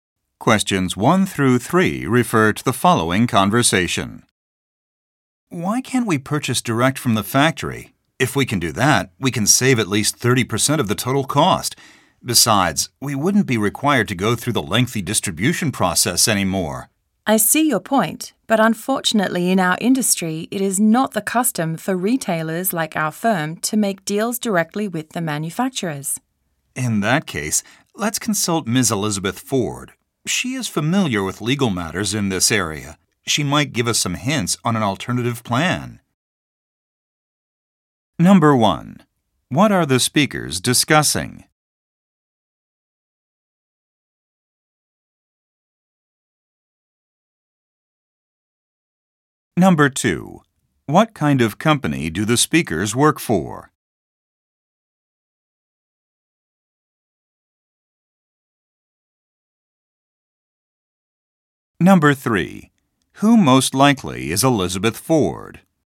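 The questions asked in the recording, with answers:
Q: What are the speakers discussing?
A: Buying directly from the factory/manufacturer to save costs

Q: What kind of company do the speakers work for?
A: A retailer

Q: Who most likely is Elizabeth Ford?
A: A legal expert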